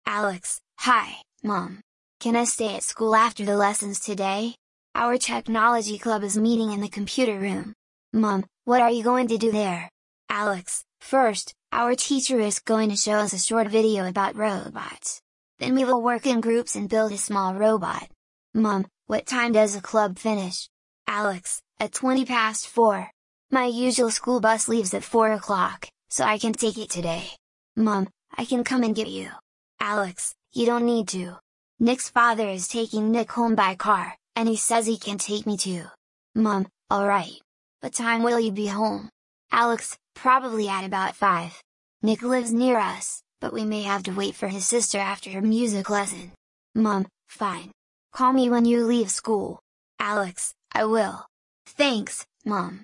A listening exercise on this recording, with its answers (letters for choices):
Ты услышишь диалог. Для каждого предложения А–Е выбери один правильный вариант ответа из трёх предложенных: 1, 2 или 3. Ты услышишь текст дважды.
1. Why is Alex calling his mother?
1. He wants her to bring his lunch.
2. He needs permission to stay after school.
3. He wants to invite a friend home.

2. Where is Alex going after the lessons?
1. To the school library.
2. To the sports centre.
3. To the computer room.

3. What are the pupils going to do first?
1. Take photos.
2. Build a robot.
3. Watch a short video.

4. Why can't Alex take the usual bus home?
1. It leaves before the club finishes.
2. It does not run on Fridays.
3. It stops far from his house.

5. How will Alex probably get home?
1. His mother will drive him.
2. He will walk with Nick.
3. Nick's father will take him.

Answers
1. 2
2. 3
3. 3
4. 1
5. 3

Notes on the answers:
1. Alex звонит маме, чтобы получить разрешение остаться после уроков.
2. Занятие технологического кружка состоится в компьютерном классе.
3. Сначала ученики посмотрят короткое видео, а затем будут собирать робота.
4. Обычный автобус отправляется в четыре часа, а кружок заканчивается позже.
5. Домой Alex отвезёт отец Nick.

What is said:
Can I stay at school after the lessons today? Our technology club is meeting in the computer room.
Mum: What are you going to do there?
Alex: First, our teacher is going to show us a short video about robots. Then we will work in groups and build a small robot.
Mum: What time does the club finish?
My usual school bus leaves at four o'clock, so I can't take it today.
Mum: I can come and get you.
Alex: You don't need to. Nick's father is taking Nick home by car, and he says he can take me too.
Mum: All right. What time will you be home?
Alex: Probably at about five. Nick lives near us, but we may have to wait for his sister after her music lesson.
Mum: Fine. Call me when you leave school.
Alex: I will. Thanks, Mum!

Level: 4 классе